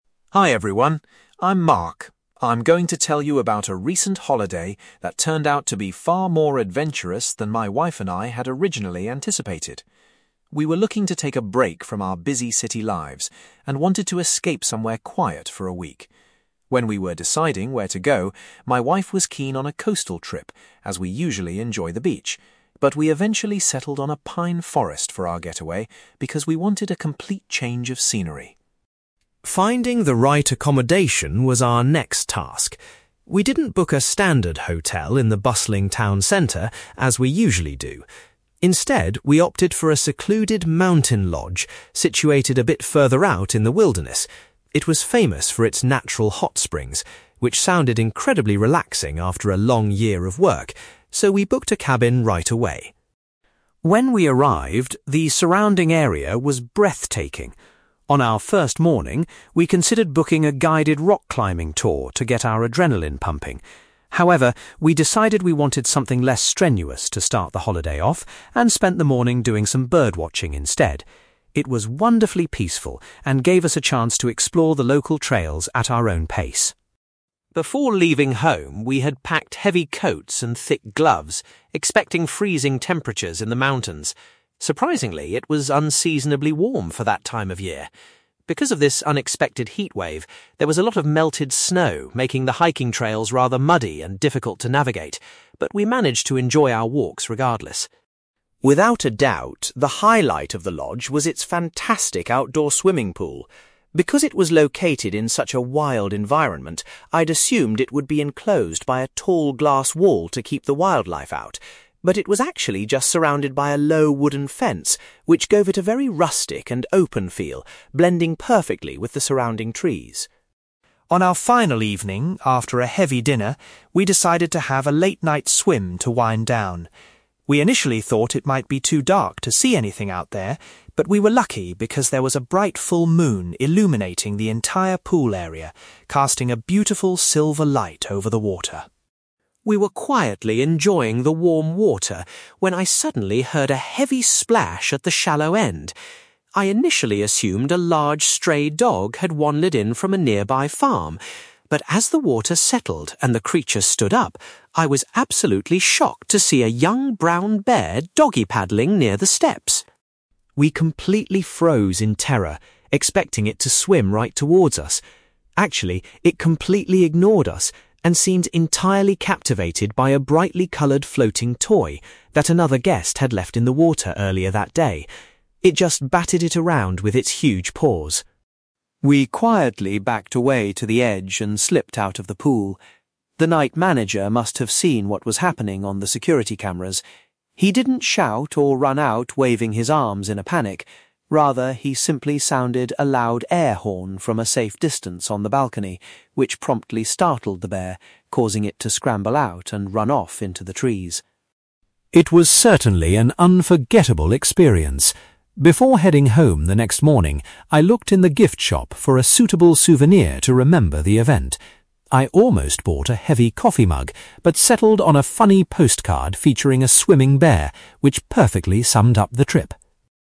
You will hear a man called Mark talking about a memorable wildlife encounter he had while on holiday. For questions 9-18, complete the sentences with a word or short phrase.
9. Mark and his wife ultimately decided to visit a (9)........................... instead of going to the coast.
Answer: pine forest

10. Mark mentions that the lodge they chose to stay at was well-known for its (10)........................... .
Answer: hot springs

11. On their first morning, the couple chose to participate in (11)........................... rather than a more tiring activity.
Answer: bird watching

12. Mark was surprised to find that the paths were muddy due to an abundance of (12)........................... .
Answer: melted snow

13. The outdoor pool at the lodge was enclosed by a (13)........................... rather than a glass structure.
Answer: wooden fence

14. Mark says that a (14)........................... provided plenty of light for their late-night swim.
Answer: full moon

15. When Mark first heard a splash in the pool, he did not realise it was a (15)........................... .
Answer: brown bear

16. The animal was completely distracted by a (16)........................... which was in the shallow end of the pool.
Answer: floating toy

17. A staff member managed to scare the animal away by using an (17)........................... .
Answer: air horn

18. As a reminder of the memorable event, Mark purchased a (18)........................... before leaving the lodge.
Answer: post card

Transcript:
Mark: Hi everyone, I'm Mark. I'm going to tell you about a recent holiday that turned out to be far more adventurous than my wife and I had originally anticipated. We were looking to take a break from our busy city lives and wanted to escape somewhere quiet for a week. When we were deciding where to go, my wife was keen on a coastal trip, as we usually enjoy the beach, but we eventually settled on a pine forest for our getaway because we wanted a complete change of scenery.
Finding the right accommodation was our next task. We didn't book a standard hotel in the bustling town centre, as we usually do. Instead, we opted for a secluded mountain lodge situated a bit further out in the wilderness. It was famous for its natural hot springs, which sounded incredibly relaxing after a long year of work, so we booked a cabin right away.
When we arrived, the surrounding area was breathtaking. On our first morning, we considered booking a guided rock climbing tour to get our adrenaline pumping. However, we decided we wanted something less strenuous to start the holiday off, and spent the morning doing some bird watching instead. It was wonderfully peaceful and gave us a chance to explore the local trails at our own pace.
Before leaving home, we had packed heavy coats and thick gloves, expecting freezing temperatures in the mountains. Surprisingly, it was unseasonably warm for that time of year. Because of this unexpected heatwave, there was a lot of melted snow making the hiking trails rather muddy and difficult to navigate, but we managed to enjoy our walks regardless.
Without a doubt, the highlight of the lodge was its fantastic outdoor swimming pool. Because it was located in such a wild environment, I'd assumed it would be enclosed by a tall glass wall to keep the wildlife out. But it was actually just surrounded by a low wooden fence, which gave it a very rustic and open feel, blending perfectly with the surrounding trees.
On our final evening, after a heavy dinner, we decided to have a late-night swim to wind down. We initially thought it might be too dark to see anything out there, but we were lucky because there was a bright full moon illuminating the entire pool area, casting a beautiful silver light over the water.
We were quietly enjoying the warm water when I suddenly heard a heavy splash at the shallow end. I initially assumed a large stray dog had wandered in from a nearby farm, but as the water settled and the creature stood up, I was absolutely shocked to see a young brown bear doggy-paddling near the steps!
We completely froze in terror, expecting it to swim right towards us. Actually, it completely ignored us and seemed entirely captivated by a brightly coloured floating toy that another guest had left in the water earlier that day. It just batted it around with its huge paws.
We quietly backed away to the edge and slipped out of the pool. The night manager must have seen what was happening on the security cameras. He didn't shout or run out waving his arms in a panic; rather, he simply sounded a loud air horn from a safe distance on the balcony, which promptly startled the bear, causing it to scramble out and run off into the trees.
It was certainly an unforgettable experience. Before heading home the next morning, I looked in the gift shop for a suitable souvenir to remember the event. I almost bought a heavy coffee mug, but settled on a funny post card featuring a swimming bear, which perfectly summed up the trip!

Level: B2